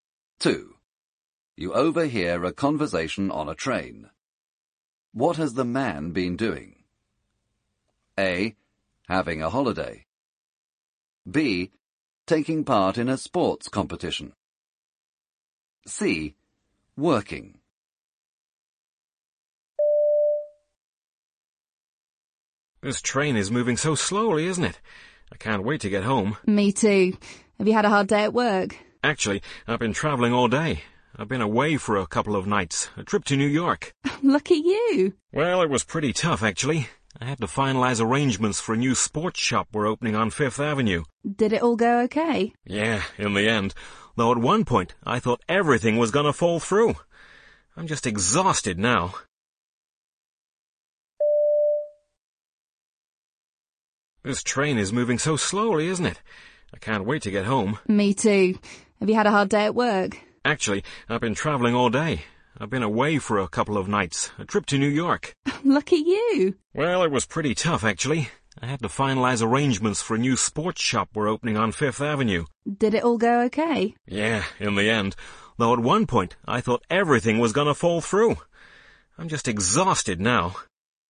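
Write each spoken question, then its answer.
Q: What has the man been doing?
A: C: Working.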